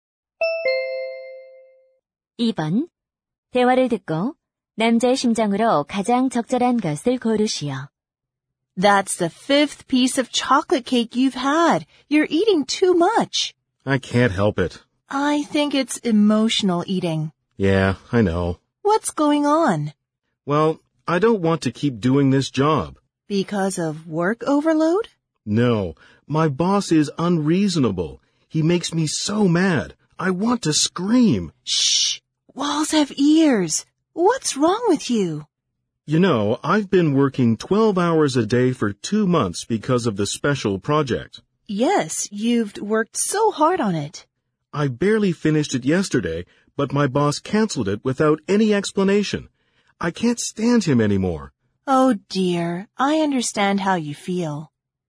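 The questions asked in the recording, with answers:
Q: 대화를 듣고 남자의 심장으로 가장 적절한 것을 고르시오.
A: 화가 나고 짜증스럽다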